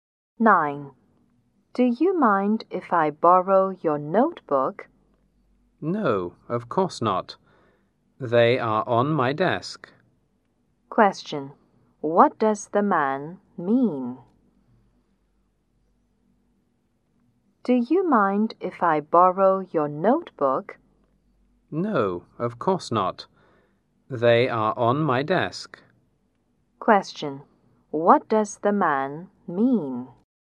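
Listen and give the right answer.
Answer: The woman may borrow his notebook.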